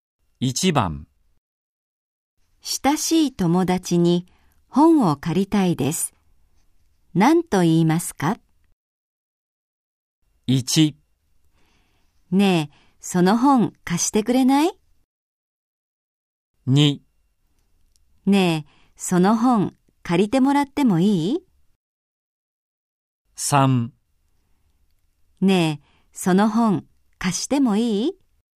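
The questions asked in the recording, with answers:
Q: 親しい友達に本を借りたいです。何と言いますか?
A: 1: ねえ、その本貸してくれない?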